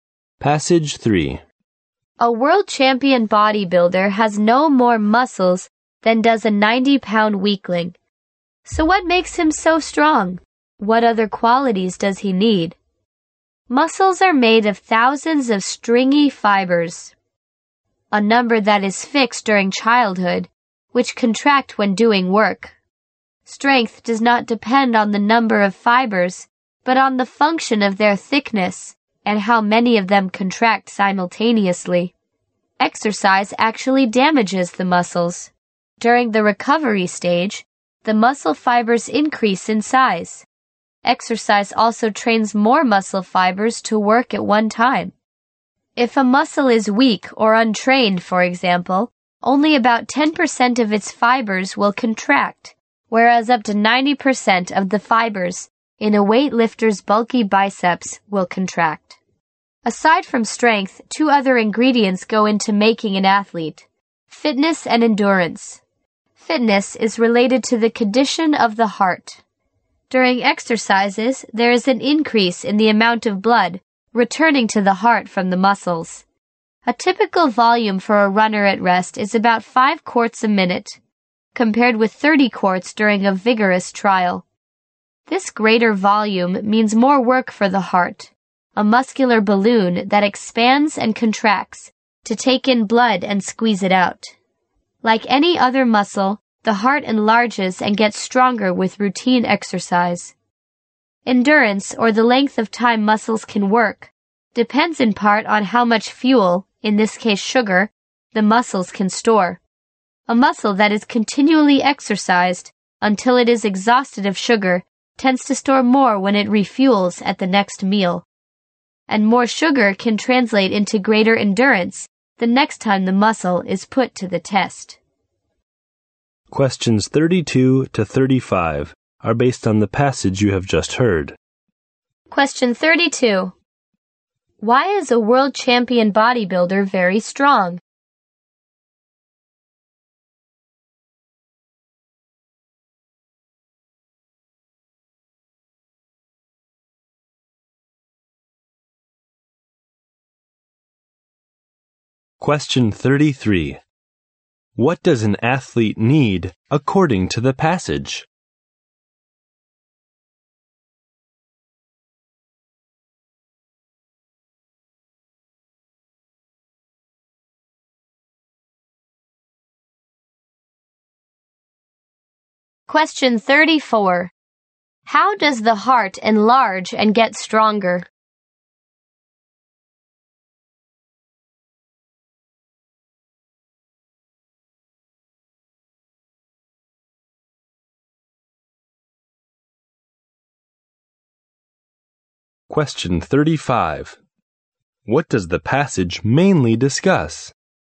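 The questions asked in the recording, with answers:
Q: Why is a world champion bodybuilder very strong?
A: His muscle fibers are thicker and more of them contract at once

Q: What does an athlete need according to the passage?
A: Strength, fitness and endurance

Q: How does the heart enlarge and get stronger?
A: Through routine exercise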